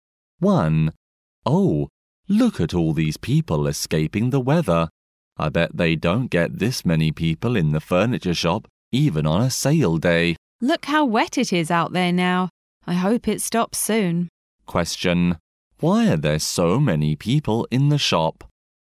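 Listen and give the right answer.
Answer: To get out of the rain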